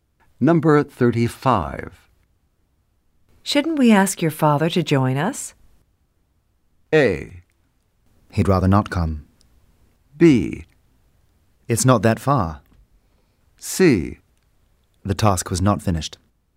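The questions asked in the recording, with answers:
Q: Shouldn't we ask your father to join us?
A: A: He'd rather not come.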